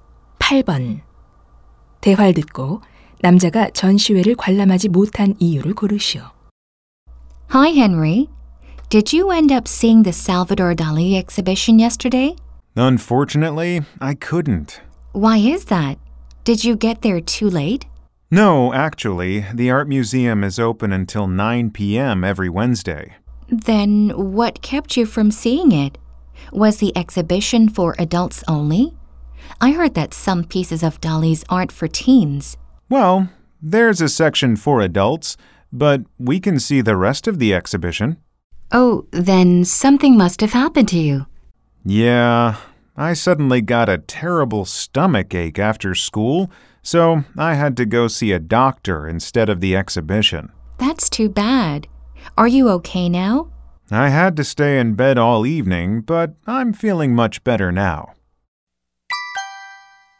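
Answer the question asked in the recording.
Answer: 갑자기 심한 복통이 나서 병원에 가야 해서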